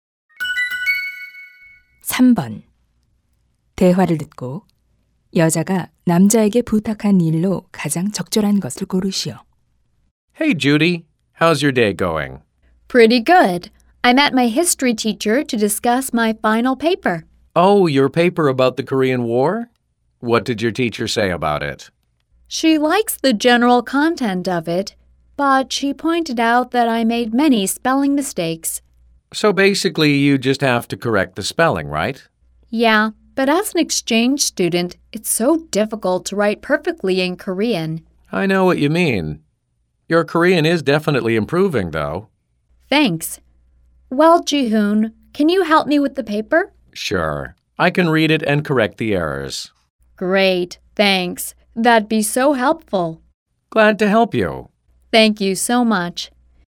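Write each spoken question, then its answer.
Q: 대화를 듣고 여자가 남자에게 부탁한 일로 가장 적절한 것을 고르시오.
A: 보고서의 맞춤법 오류 고쳐 주기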